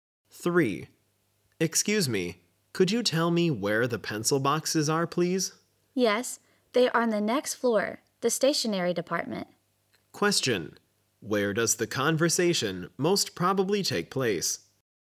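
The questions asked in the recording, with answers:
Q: Question. Where does the conversation most probably take place?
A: In a department store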